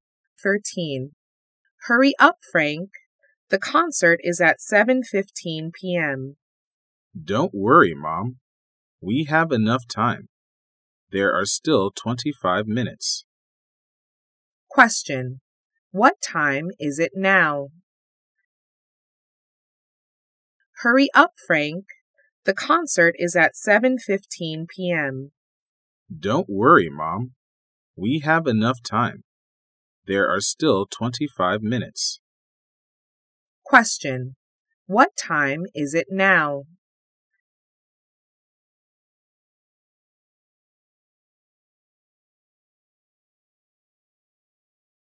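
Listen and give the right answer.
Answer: 6:50 p.m.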